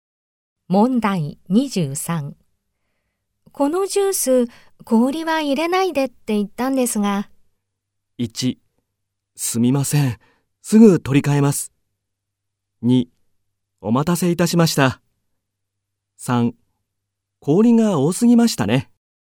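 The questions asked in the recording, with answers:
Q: このジュース氷は入れないでって言ったんですが。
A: 1: すみません、すぐ取り替えます。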